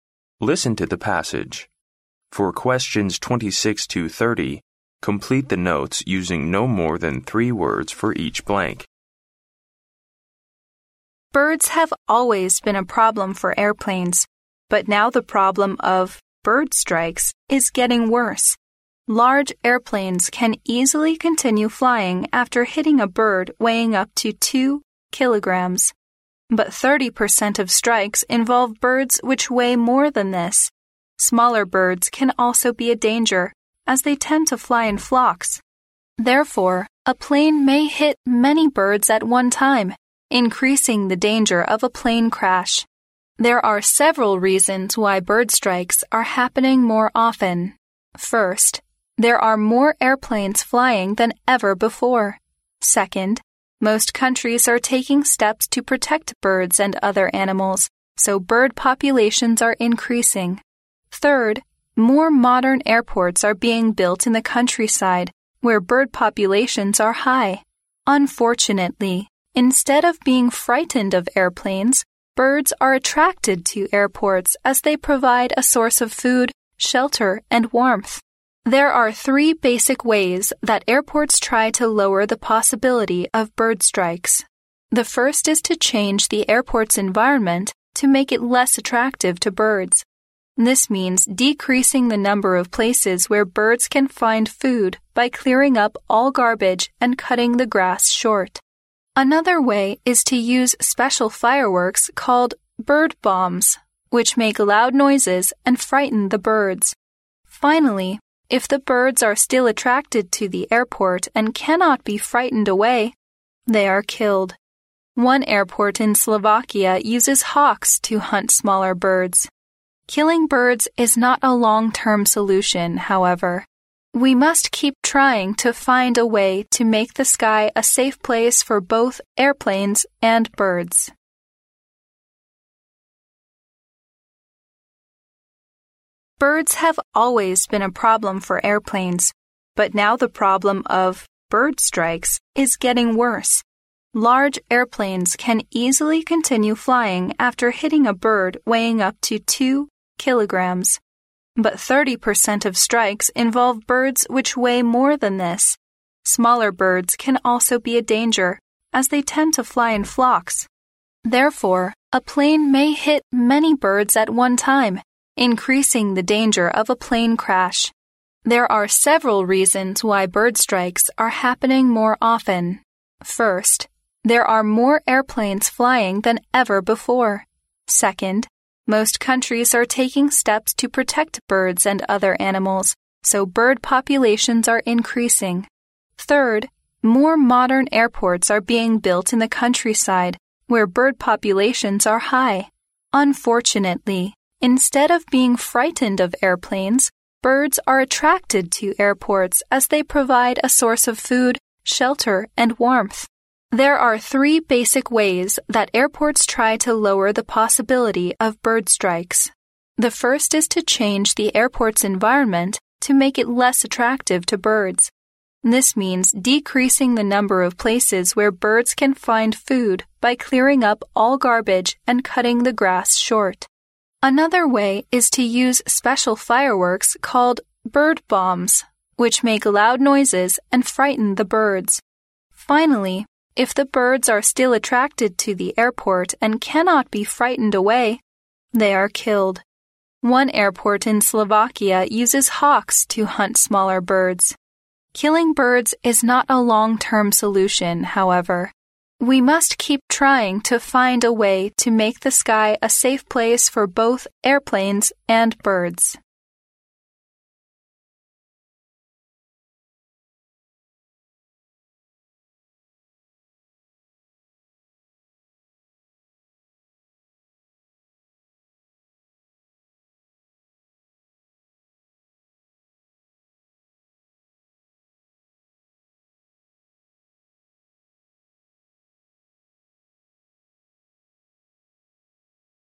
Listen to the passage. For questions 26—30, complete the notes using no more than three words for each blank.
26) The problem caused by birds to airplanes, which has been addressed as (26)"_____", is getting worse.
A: bird strikes

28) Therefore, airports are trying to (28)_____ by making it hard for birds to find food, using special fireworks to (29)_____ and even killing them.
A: change the environment

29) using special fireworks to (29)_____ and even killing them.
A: frighten them

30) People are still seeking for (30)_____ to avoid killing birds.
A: a long-term solution

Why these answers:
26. 录音开头提到鸟类一直困扰着飞机飞行,但现在"the problem of 'bird strikes' is getting worse"。由此可知,鸟类困扰飞机飞行的问题被称为"bird strike"。
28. 录音中提到了一些解决措施。第一条提到"要改变机场环境,减少对鸟类的吸引力",这意味着要使鸟类在机场附近难以觅食。
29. 录音提到的第二条解决措施是用特制烟花"鸟类炸弹"来制造噪音恐吓鸟类,以驱散机场附近的鸟类。由此可知"鸟类炸弹"的作用是恐吓鸟类。
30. 录音结尾提到杀鸟不是长久措施,我们应当继续寻找合适方法。由此可知人们正在寻找能够解决这个问题的长久措施。

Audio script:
Birds have always been a problem for airplanes, but now the problem of "bird strikes" is getting worse. Large airplanes can easily continue flying after hitting a bird weighing up to 2kg, but 30% of strikes involve birds which weigh more than this. Smaller birds can also be a danger, as they tend to fly in flocks. Therefore, a plane may hit many birds at one time, increasing the danger of a plane crash.
There are several reasons why bird strikes are happening more often. First, there are more airplanes flying than ever before. Second, most countries are taking steps to protect birds and other animals, so bird populations are increasing. Third, more modern airports are being built in the countryside, where bird populations are high. Unfortunately, instead of being frightened of airplanes, birds are attracted to airports as they provide a source of food, shelter, and warmth.
There are three basic ways that airports try to lower the possibility of bird strikes. The first is to change the airport's environment to make it less attractive to birds. This means decreasing the number of places where birds can find food by clearing up all garbage and cutting the grass short. Another way is to use special fireworks called "bird bombs" which make loud noises and frighten the birds. Finally, if the birds are still attracted to the airport and cannot be frightened away, they are killed. One airport in Slovakia uses hawks to hunt smaller birds.
Killing birds is not a long-term solution, however. We must keep trying to find a way to make the sky a safe place for both airplanes and birds.